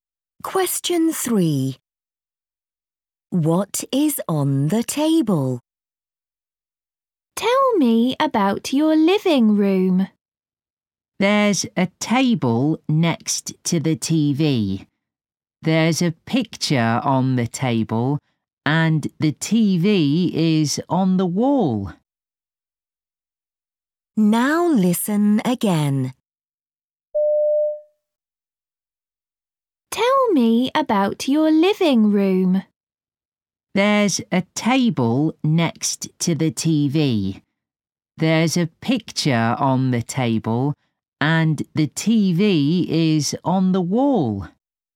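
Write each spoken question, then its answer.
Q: What is on the table?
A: A picture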